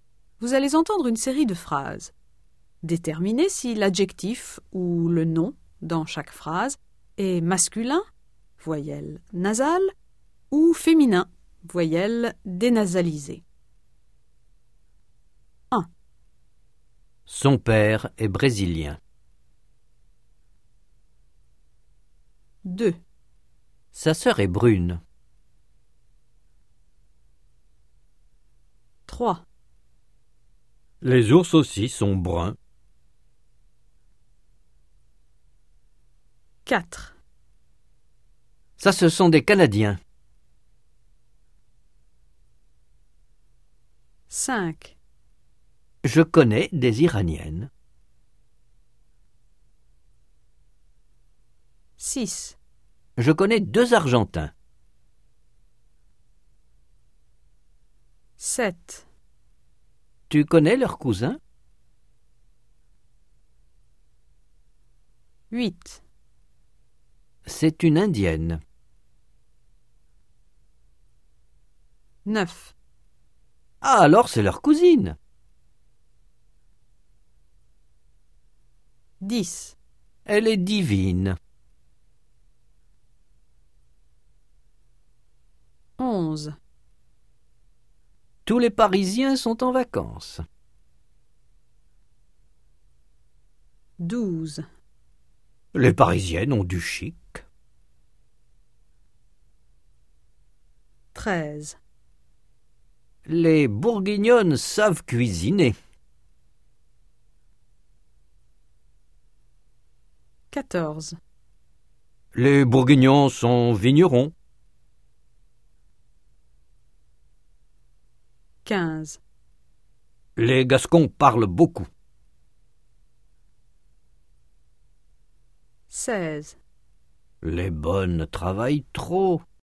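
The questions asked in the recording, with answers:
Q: Son père est brésilien.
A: masculin (voyelle nasale)

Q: Sa sœur est brune.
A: féminin (voyelle dénasalisée)

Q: Les ours aussi sont bruns.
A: masculin (voyelle nasale)

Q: Ça, ce sont des Canadiens.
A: masculin (voyelle nasale)

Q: Je connais des Iraniennes.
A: féminin (voyelle dénasalisée)

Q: Je connais deux Argentins.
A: masculin (voyelle nasale)

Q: Tu connais leurs cousins?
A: masculin (voyelle nasale)

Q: C'est une Indienne.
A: féminin (voyelle dénasalisée)

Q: Ah, alors c'est leur cousine.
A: féminin (voyelle dénasalisée)

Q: Elle est divine.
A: féminin (voyelle dénasalisée)

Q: Tous les Parisiens sont en vacances.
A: masculin (voyelle nasale)

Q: Les Parisiennes ont du chic.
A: féminin (voyelle dénasalisée)

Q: Les Bourguignonnes savent cuisiner.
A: féminin (voyelle dénasalisée)

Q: Les Bourguignons sont vignerons.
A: masculin (voyelle nasale)

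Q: Les Gascons parlent beaucoup.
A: masculin (voyelle nasale)

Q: Les bonnes travaillent trop.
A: féminin (voyelle dénasalisée)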